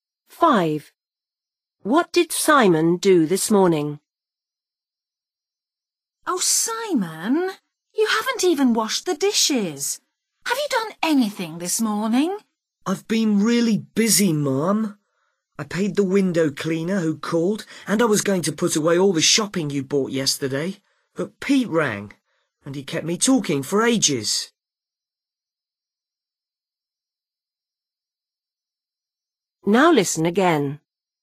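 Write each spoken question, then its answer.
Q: What did Simon do this morning?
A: He paid the window cleaner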